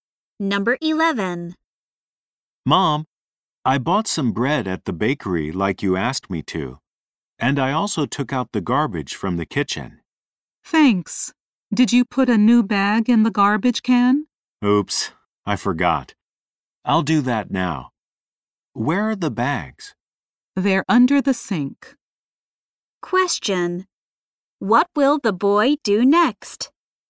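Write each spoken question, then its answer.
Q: What will the boy do next?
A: Put a new bag in the garbage can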